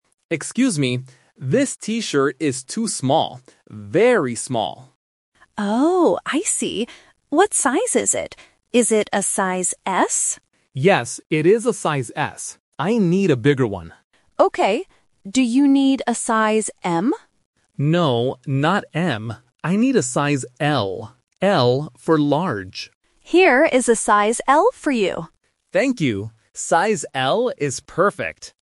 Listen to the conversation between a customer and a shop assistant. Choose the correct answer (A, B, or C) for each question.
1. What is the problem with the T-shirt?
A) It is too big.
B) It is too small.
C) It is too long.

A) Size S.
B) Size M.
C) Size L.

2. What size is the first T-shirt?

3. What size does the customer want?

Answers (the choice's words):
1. It is too small.
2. Size S.
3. Size L.

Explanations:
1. The customer clearly says in the first line, "This T-shirt is too small. Very small." Option A (too big) is the opposite of the truth. Option C is not mentioned in the audio.
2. The assistant asks, "Is it a size S?" and the customer answers, "Yes, it is a size S." Options B and C are traps because they are mentioned later in the conversation, but they are not the size of the first T-shirt.
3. The customer explicitly says, "I need a size L." Option B (Size M) is the trap because the assistant asks, "Do you need a size M?", but the customer says "No, not M." Option A is the size that is too small.

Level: A1